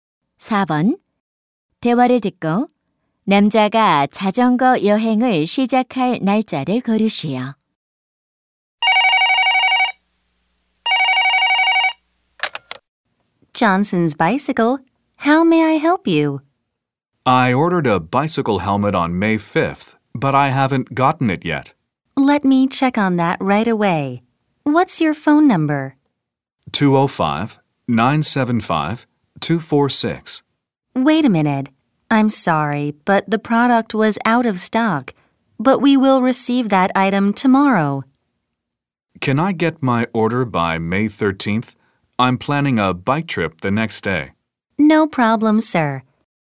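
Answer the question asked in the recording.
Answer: 5월 14일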